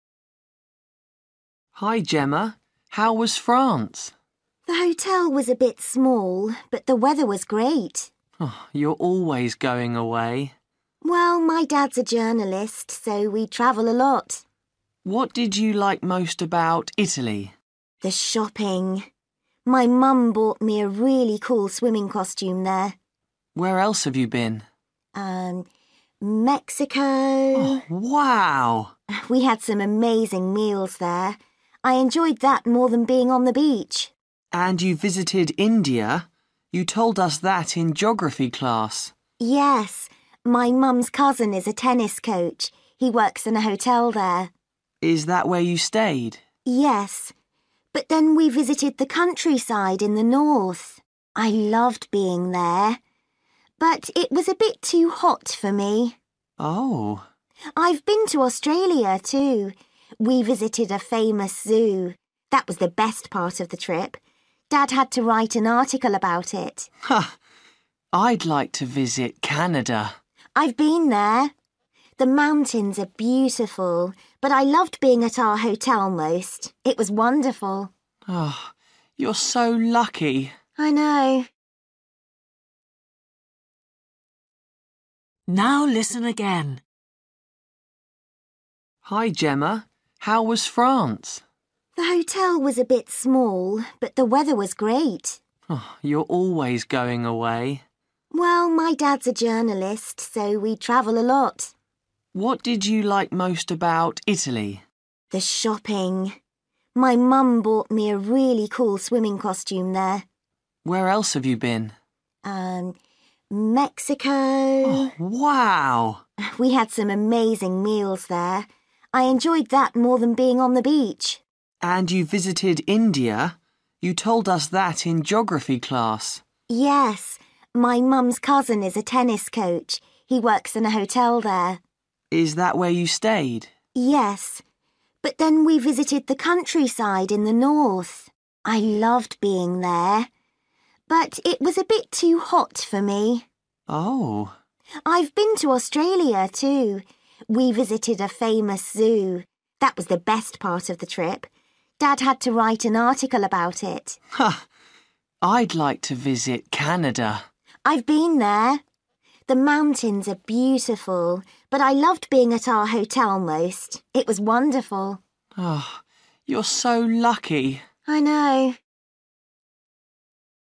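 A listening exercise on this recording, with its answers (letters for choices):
For each question, choose the correct answer.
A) animals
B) beach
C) countryside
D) food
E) hotel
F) shops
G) sport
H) weather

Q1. Italy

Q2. Mexico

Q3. India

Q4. Australia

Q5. Canada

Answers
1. F
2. D
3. C
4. A
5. E

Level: Luyện nghe trình độ A2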